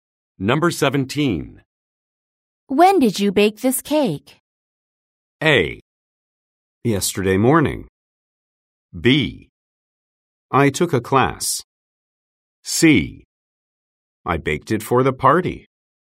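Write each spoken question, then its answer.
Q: When did you bake this cake?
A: A: Yesterday morning.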